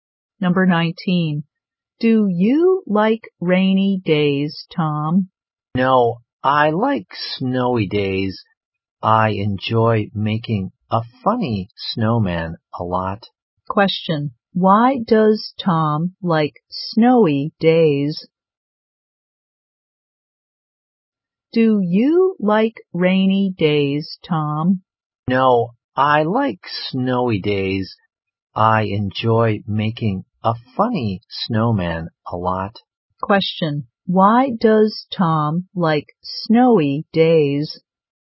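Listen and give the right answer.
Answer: He enjoys making a funny snowman.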